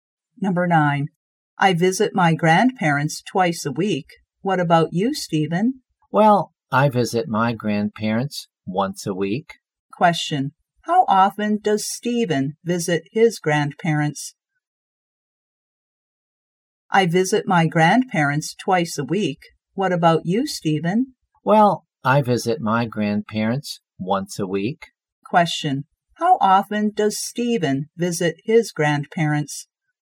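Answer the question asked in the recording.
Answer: Once a week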